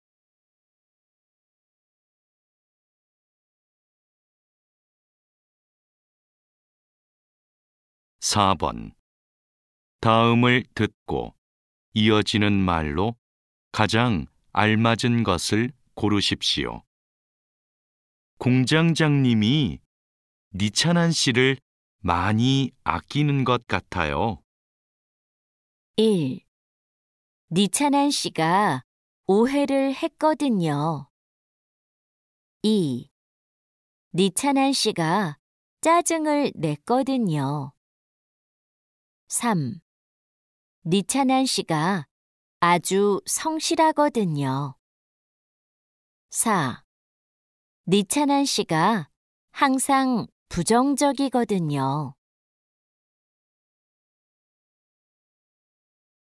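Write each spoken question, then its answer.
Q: 공장장님이 니찬한 씨를 많이 아끼는 것 같아요.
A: 3: 니찬한 씨가 아주 성실하거든요.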